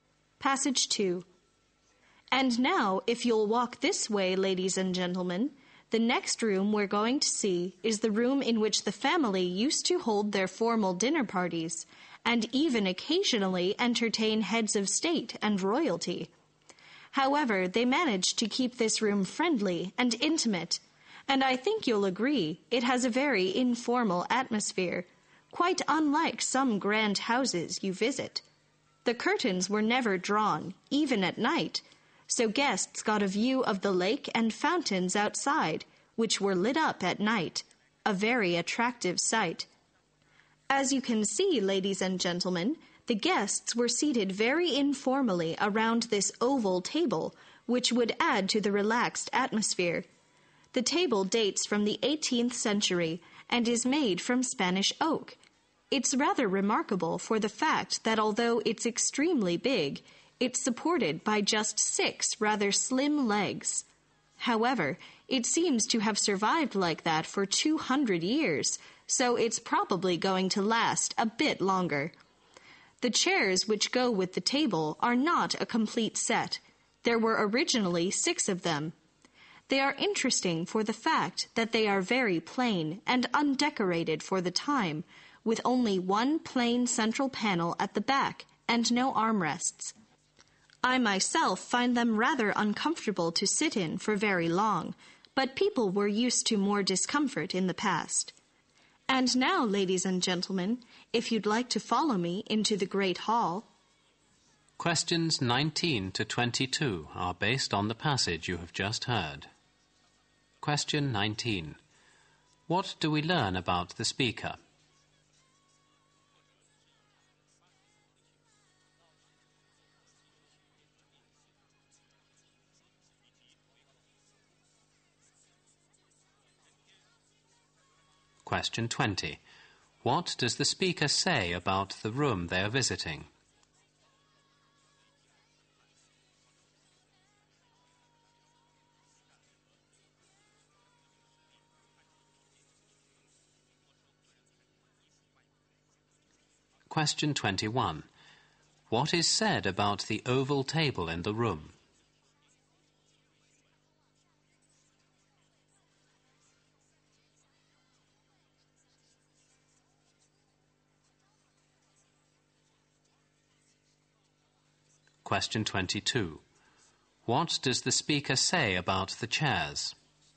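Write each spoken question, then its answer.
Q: What do we learn about the speaker?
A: The speaker is a tour guide.

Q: What does the speaker say about the room they are visiting?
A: It has a friendly, informal atmosphere, and formal dinner parties were held there.

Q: What is said about the oval table in the room?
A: It is very big but is supported by just six slim legs.

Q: What does the speaker say about the chairs?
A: They are very plain and uncomfortable.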